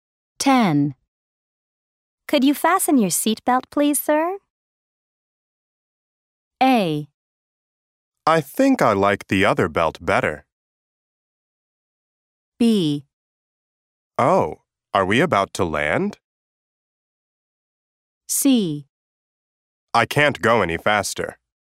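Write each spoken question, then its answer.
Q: Could you fasten your seatbelt, please, sir?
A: B: Oh, are we about to land?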